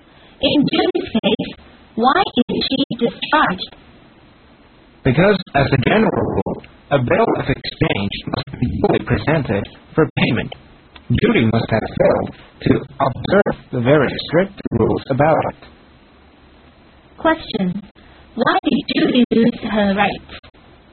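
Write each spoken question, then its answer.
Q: Why did Judy lose her rights?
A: She failed to follow the strict rules for presenting a bill of exchange for payment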